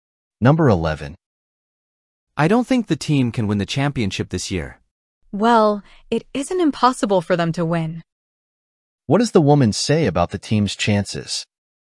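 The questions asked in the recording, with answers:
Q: What does the woman say about the team's chances?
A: The team could possibly win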